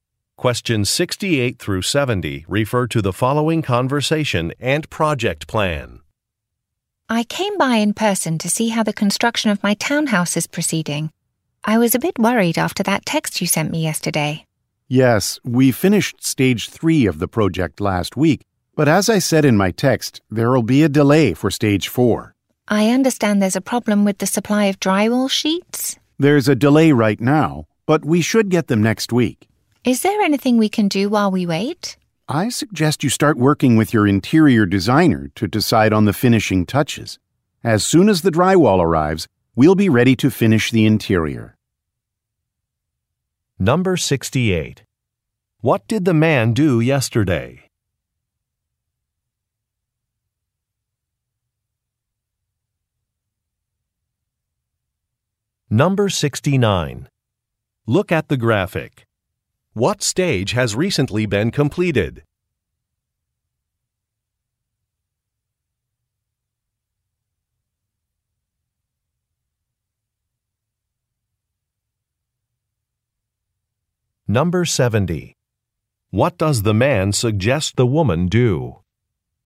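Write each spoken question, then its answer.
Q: What did the man do yesterday?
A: Sent a text message

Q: What does the man suggest the woman do?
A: Work with her interior designer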